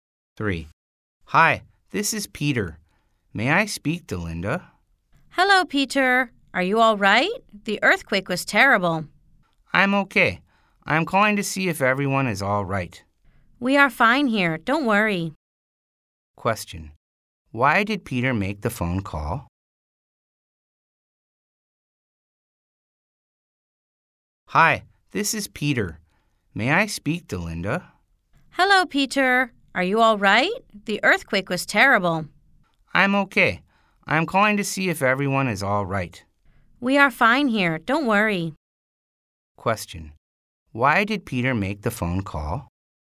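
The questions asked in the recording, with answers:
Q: Why did Peter make the phone call?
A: To see if everyone was all right after the earthquake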